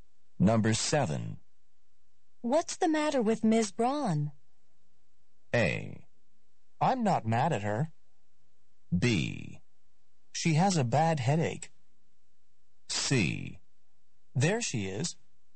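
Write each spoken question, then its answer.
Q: What's the matter with Ms.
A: B: She has a bad headache.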